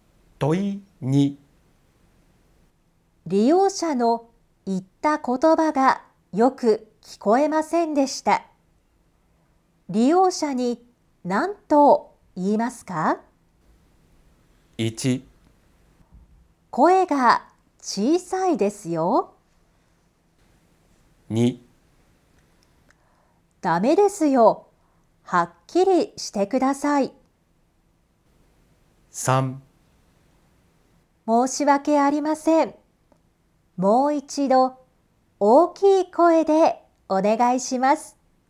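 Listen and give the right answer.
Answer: 3: 申し訳ありません。もう一度大きい声でお願いします。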